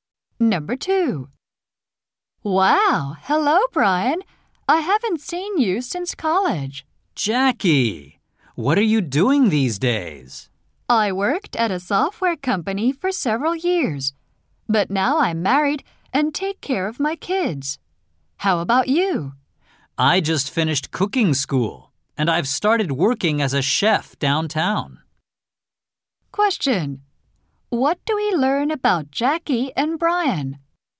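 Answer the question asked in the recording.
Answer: They went to college together and have not met since.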